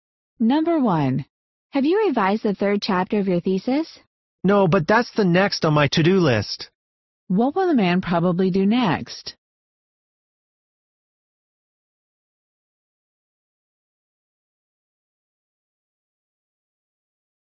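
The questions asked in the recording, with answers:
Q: What will the man probably do next?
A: Revise the third chapter of his thesis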